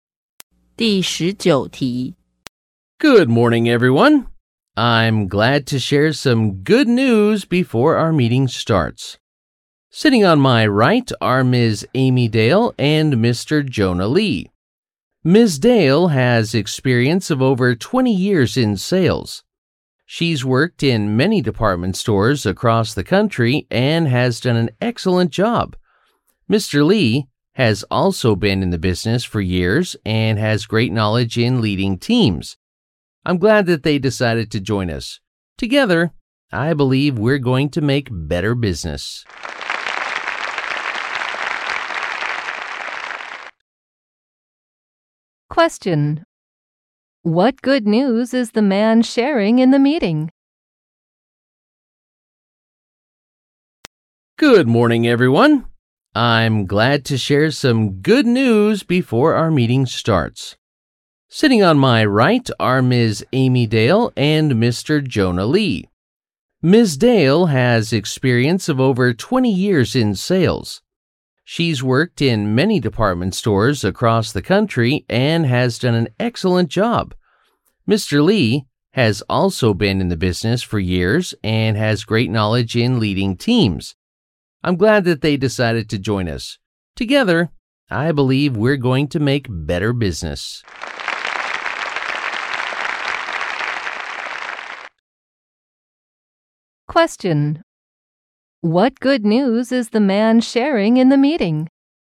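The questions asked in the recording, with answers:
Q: What good news is the man sharing in the meeting?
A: Two experienced people, Ms. Dale and Mr. Lee, are joining the company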